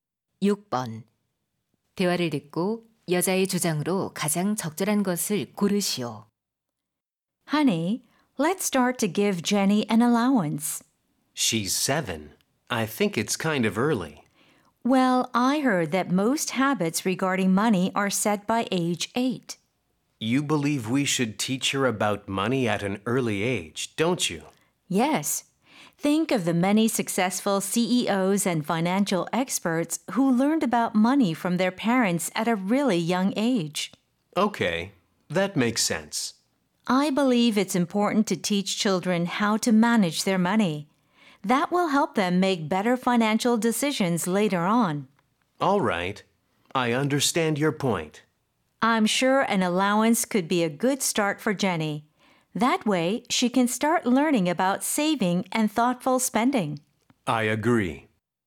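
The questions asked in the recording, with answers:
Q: 대화를 듣고 여자의 주장으로 가장 적절한 것을 고르시오.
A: 아이들에게 어릴 때부터 돈 관리하는 법을 가르쳐야 한다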